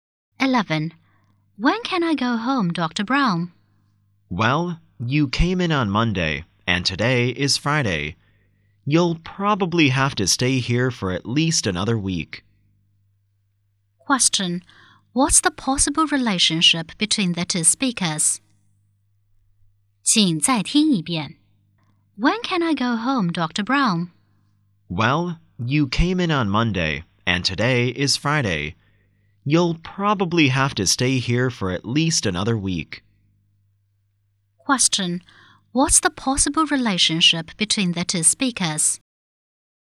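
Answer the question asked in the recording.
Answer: Doctor and patient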